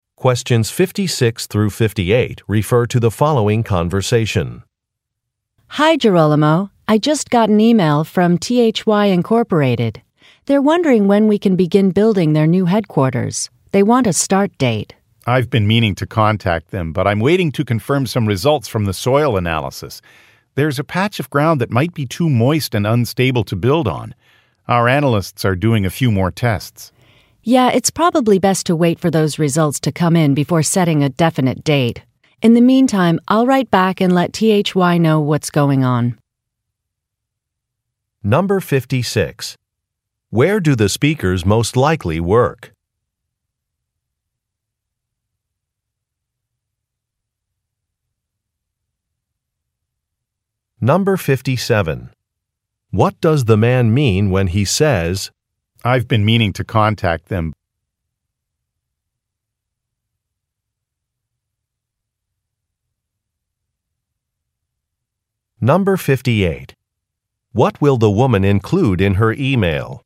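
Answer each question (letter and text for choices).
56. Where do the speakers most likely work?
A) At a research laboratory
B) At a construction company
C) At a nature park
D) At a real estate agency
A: B) At a construction company

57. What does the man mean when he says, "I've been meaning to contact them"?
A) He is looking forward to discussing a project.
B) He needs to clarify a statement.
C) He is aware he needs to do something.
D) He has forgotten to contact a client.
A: C) He is aware he needs to do something.

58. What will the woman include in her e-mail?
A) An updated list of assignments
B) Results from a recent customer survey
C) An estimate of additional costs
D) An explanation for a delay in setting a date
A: D) An explanation for a delay in setting a date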